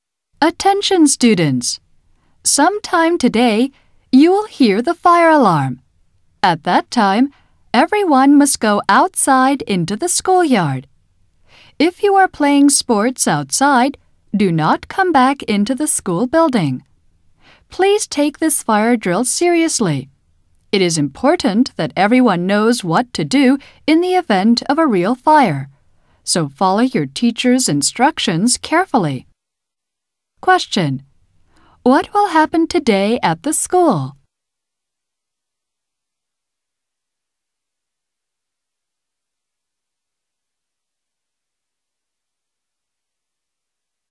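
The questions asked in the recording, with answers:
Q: What will happen today at the school?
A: There will be a fire drill.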